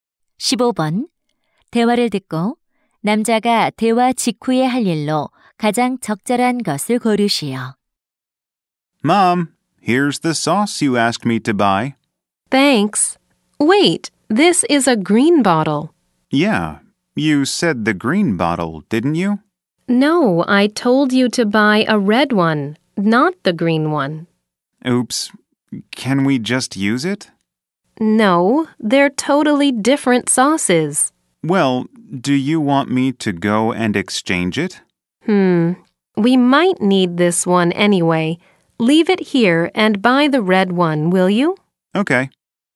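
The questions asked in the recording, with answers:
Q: 15번. 대화를 듣고 남자가 대화 직후에 할 일로 가장 적절한 것을 고르시오.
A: 빨간 병 소스 사러 가기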